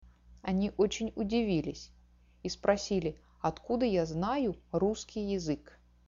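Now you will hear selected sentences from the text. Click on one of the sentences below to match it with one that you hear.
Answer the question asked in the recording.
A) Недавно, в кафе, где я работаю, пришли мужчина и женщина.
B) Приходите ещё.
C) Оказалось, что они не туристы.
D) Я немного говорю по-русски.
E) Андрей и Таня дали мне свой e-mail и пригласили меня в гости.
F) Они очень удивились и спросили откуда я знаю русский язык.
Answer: F) Они очень удивились и спросили откуда я знаю русский язык.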